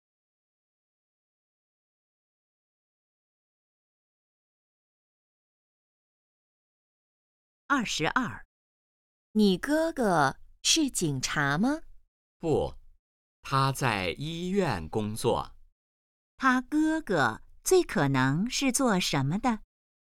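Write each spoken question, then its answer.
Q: 他哥哥最可能是做什么的?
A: 医生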